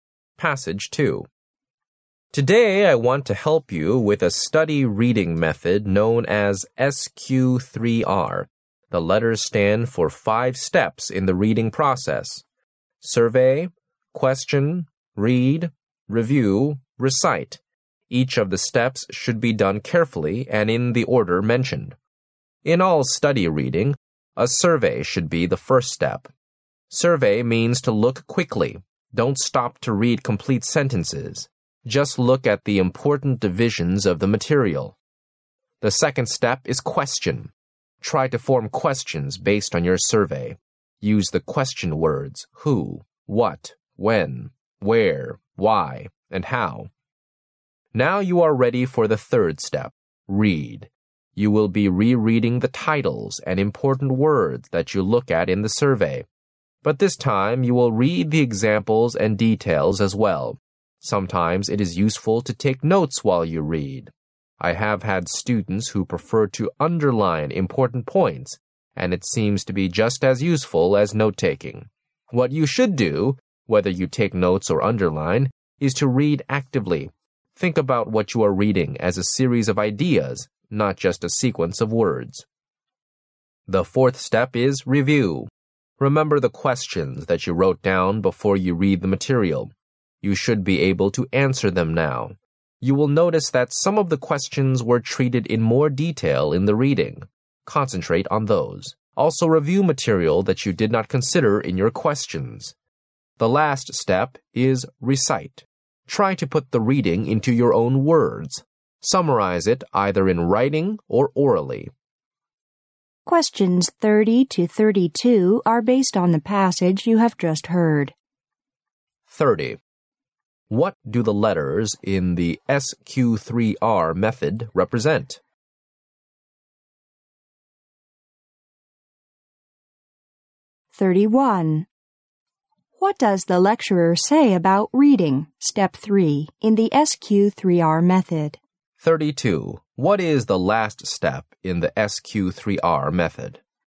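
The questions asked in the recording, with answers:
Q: What do the letters in the SQ3R method represent?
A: Five reading steps: survey, question, read, review, recite.

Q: What is the last step in the SQ3R method?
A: Recite.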